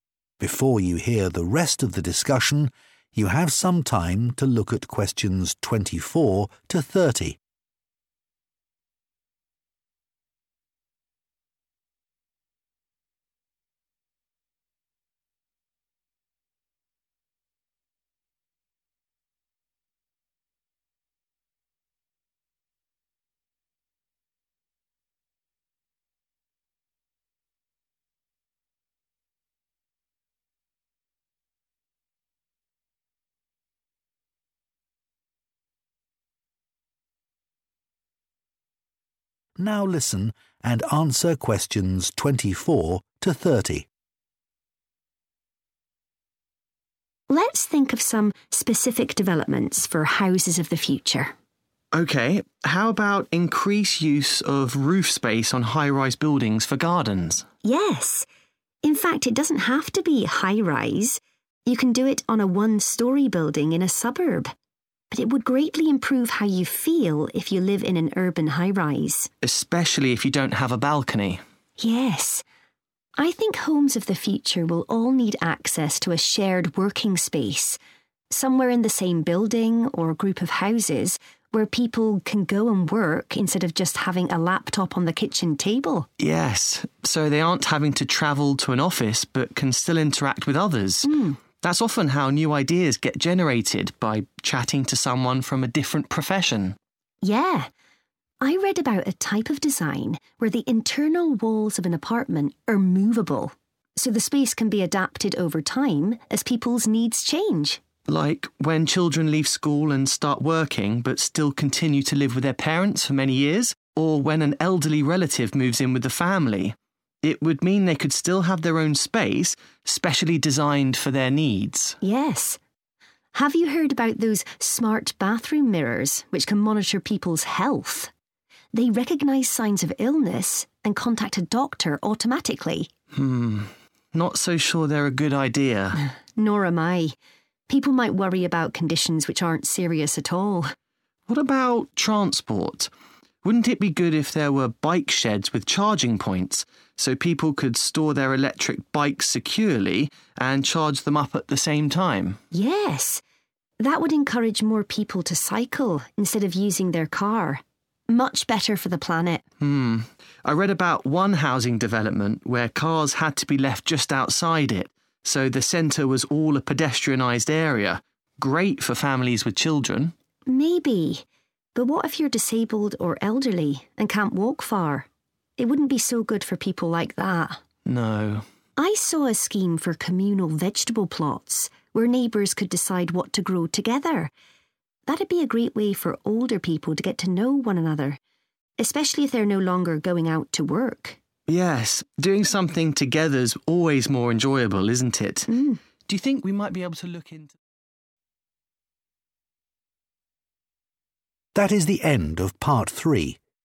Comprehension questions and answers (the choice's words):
Choose SEVEN answers from the box and write the correct letter, A–I, next to Questions 24–30.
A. This could cause unnecessary anxiety.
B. This would be especially beneficial for city residents.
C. This would be challenging for young people.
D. This would have environmental benefits.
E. This could encourage creativity.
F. This could lead to social problems.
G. This could enable retired people to share a project.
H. This would help some people but cause problems for others.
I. This would suit both existing and new members of a household.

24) use of roof space for gardens __________________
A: This would be especially beneficial for city residents.

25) shared working spaces __________________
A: This could encourage creativity.

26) moveable internal walls __________________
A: This would suit both existing and new members of a household.

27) smart mirrors in bathrooms __________________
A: This could cause unnecessary anxiety.

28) bike sheds with charging points __________________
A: This would have environmental benefits.

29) restriction of cars to certain areas __________________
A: This would help some people but cause problems for others.

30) communal vegetable plots __________________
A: This could enable retired people to share a project.

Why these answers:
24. Mia nói rằng việc làm vườn trên mái sẽ cải thiện rất lớn cảm xúc của bạn nếu bạn sống trong một tòa nhà cao tầng ở đô thị
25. Leo nhận xét rằng không gian làm việc chung giúp mọi người tương tác và trò chuyện với những người khác ngành nghề, và đó là cách mà các ý tưởng mới thường được tạo ra.
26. Leo giải thích những bức tường di động sẽ giúp không gian thay đổi theo nhu cầu của gia đình, ví dụ khi con cái lớn bắt đầu đi làm vẫn ở chung với bố mẹ, hoặc khi có người lớn tuổi chuyển đến ở cùng.
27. Cả hai bạn đều nghi ngờ về ý tưởng này. Mia giải thích rằng mọi người có thể sẽ lo lắng về những tình trạng sức khỏe hoàn toàn không có gì nghiêm trọng.
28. Mia khẳng định việc có nhà để xe đạp điện sẽ khuyến khích mọi người đạp xe thay vì đi ô tô, và điều đó tốt hơn nhiều cho hành tinh của chúng ta.
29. Leo nói việc cấm ô tô ở một số khu vực để làm phố đi bộ sẽ rất tuyệt vời cho các gia đình có trẻ em. Nhưng Mia phản bác lại rằng nếu là người khuyết tật hay người già có thể thấy bất tiện.
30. Mia nói rằng các mảnh đất trồng rau chung sẽ là một cách tuyệt vời để những người lớn tuổi (không còn đi làm nữa) làm quen với nhau.

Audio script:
So, one way of meeting that demand might be to use existing commercial buildings and adapt them to form accommodation.
Mia: Mm, or come up with original ways of organizing space so that people can live in smaller homes. But I think the solution is to design multi-story apartment blocks.
Leo: Building up rather than out, yes.
Before you hear the rest of the discussion, you have some time to look at questions 24 to 30.(Pause) Now listen and answer questions 24 to 30.
Mia: Let's think of some specific developments for houses of the future.
How about increase use of roof space on high-rise buildings for gardens?
Mia: Yes! In fact, it doesn't have to be high-rise. You can do it on a one-story building in a suburb. But it would greatly improve how you feel if you live in an urban high-rise.
Leo: Especially if you don't have a balcony.
Mia: Yes. I think homes of the future will all need access to a shared working space, somewhere in the same building or group of houses, where people can go and work instead of just having a laptop on the kitchen table.
Leo: Yes, so they aren't having to travel to an office, but can still interact with others. Mm, that's often how new ideas get generated by chatting to someone from a different profession.
Mia: Yeah. I read about a type of design where the internal walls of an apartment are movable, so the space can be adapted over time as people's needs change.
Leo: Like when children leave school and start working but still continue to live with their parents for many years, or when an elderly relative moves in with the family. It would mean they could still have their own space, specially designed for their needs.
Mia: Yes. Have you heard about those smart bathroom mirrors which can monitor people's health? They recognize signs of illness and contact a doctor automatically.
Leo: Hm... not so sure they're a good idea.
Mia: Nor am I. People might worry about conditions which aren't serious at all. What about transport? Wouldn't it be good if there were bike sheds with charging points, so people could store their electric bikes securely and charge them up at the same time?
Mia: Yes! That would encourage more people to cycle instead of using their car. Much better for the planet.
Leo: Mm. I read about one housing development where cars had to be left just outside it, so the center was all a pedestrianized area. Great for families with children.
Mia: Maybe, but what if you're disabled or elderly and can't walk far? It wouldn't be so good for people like that.
Leo: No.
Mia: I saw a scheme for communal vegetable plots, where neighbors could decide what to grow together. That'd be a great way for older people to get to know one another, especially if they're no longer going out to work.
Leo: Yes, doing something together's always more enjoyable, isn't it? Do you think we might be able to look into...
That is the end of part 3.